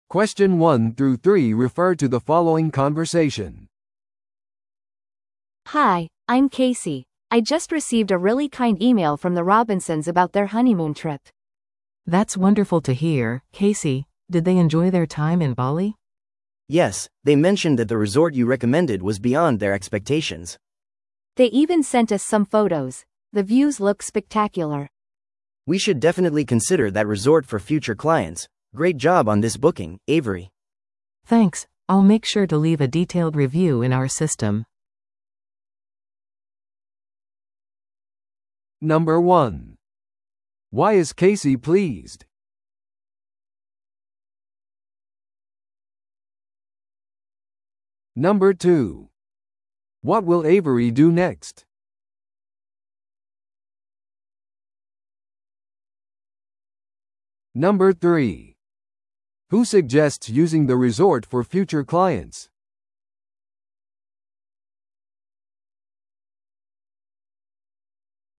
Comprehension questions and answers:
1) Why is Casey pleased?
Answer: ロビンソン夫妻が勧められたリゾートを称賛したから。

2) What will Avery do next?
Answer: システムにリゾートのレビューを残す。

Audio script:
A: Hi, I'm Casey. I just received a really kind email from the Robinsons about their honeymoon trip.
B: That's wonderful to hear, Casey! Did they enjoy their time in Bali?
C: Yes, they mentioned that the resort you recommended was beyond their expectations.
A: They even sent us some photos. The views look spectacular!
C: We should definitely consider that resort for future clients. Great job on this booking, Avery.
B: Thanks! I'll make sure to leave a detailed review in our system.